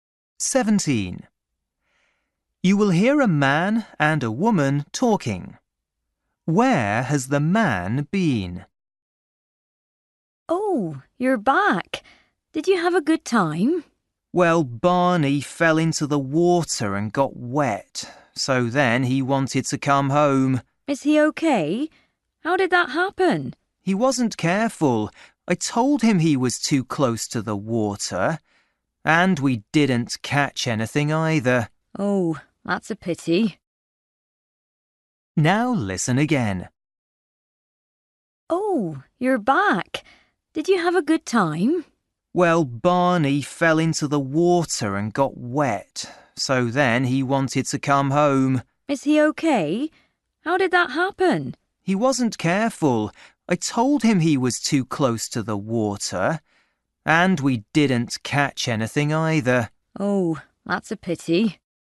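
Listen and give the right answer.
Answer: fishing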